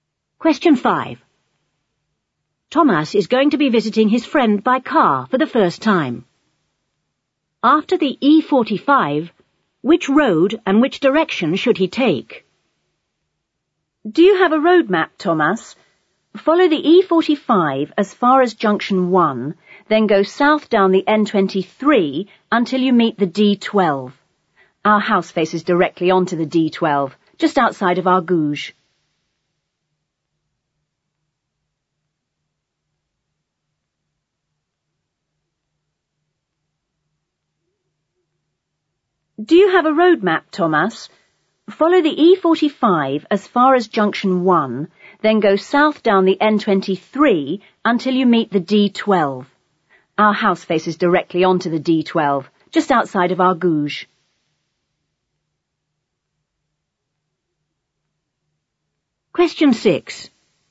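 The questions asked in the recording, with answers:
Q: After the E45, which road and which direction should he take?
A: The N23, going south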